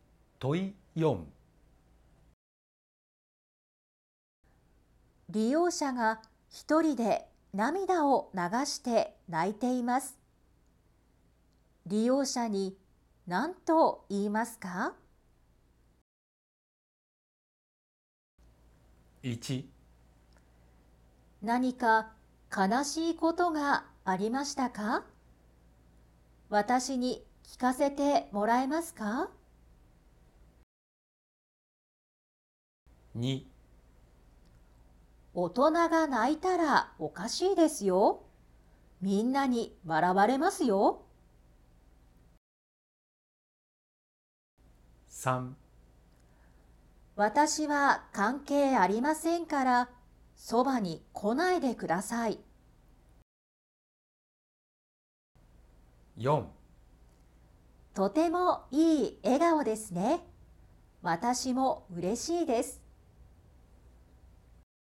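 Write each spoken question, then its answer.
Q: 利用者が一人で涙を流して泣いています。利用者に何と言いますか?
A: 1: 何か悲しいことがありましたか?私に聞かせてもらえますか?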